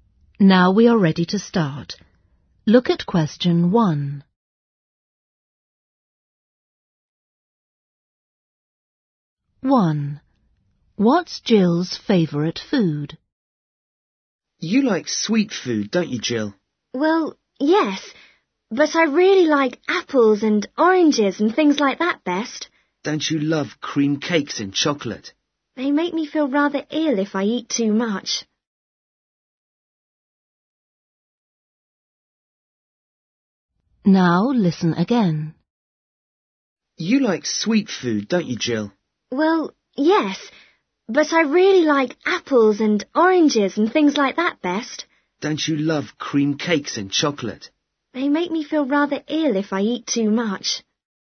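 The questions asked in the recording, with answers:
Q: What's Jill's favourite food?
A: fruit (apples and oranges)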